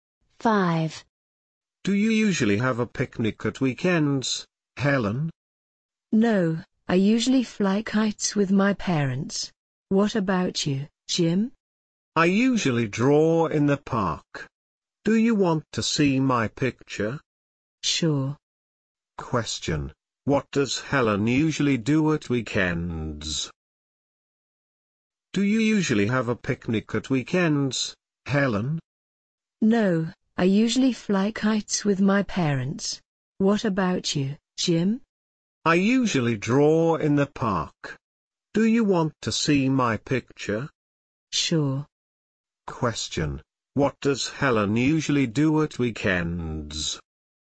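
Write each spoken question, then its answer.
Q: Question, what does Helen usually do at weekends?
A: She usually flies kites with her parents.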